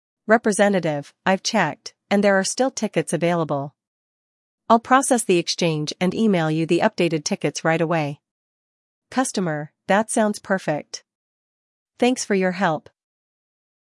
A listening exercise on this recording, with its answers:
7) What does the representative confirm regarding availability?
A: The representative confirms there are still tickets available.

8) How will the customer receive the updated tickets?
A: The tickets will be emailed to the customer.

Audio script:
Representative: I've checked, and there are still tickets available. I'll process the exchange and email you the updated tickets right away.
Customer: That sounds perfect. Thanks for your help.